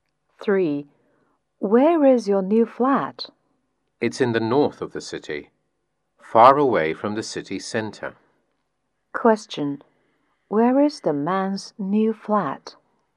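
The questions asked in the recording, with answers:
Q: Where is the man's new flat?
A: In the north of the city, far from the city center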